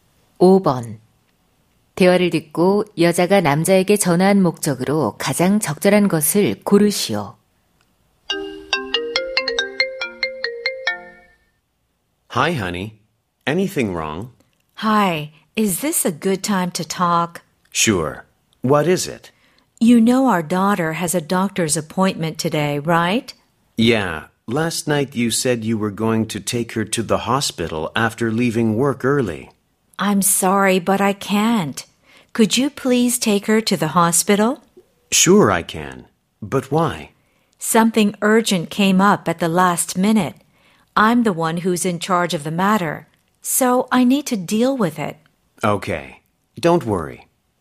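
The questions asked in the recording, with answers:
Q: 대화를 듣고 여자가 남자에게 전화한 목적으로 가장 적절한 것을 고르시오.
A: 딸을 병원에 데려가 달라고 부탁하려고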